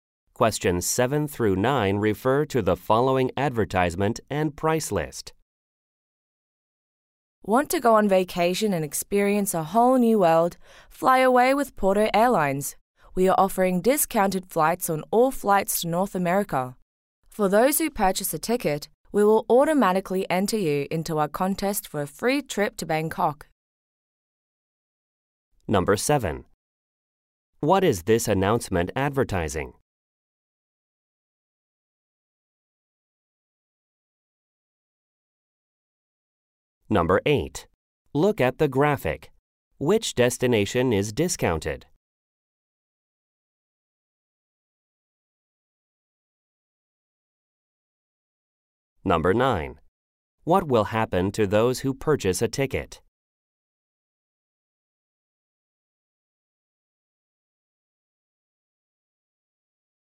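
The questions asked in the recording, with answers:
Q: What is this announcement advertising?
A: Discounted flights with Porto Airlines

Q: What will happen to those who purchase a ticket?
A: They will be entered into a contest for a free trip to Bangkok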